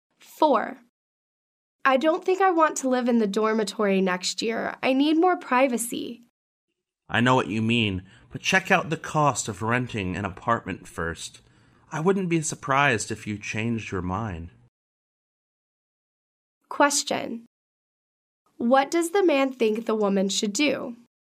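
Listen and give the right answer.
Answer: Check the cost of renting an apartment first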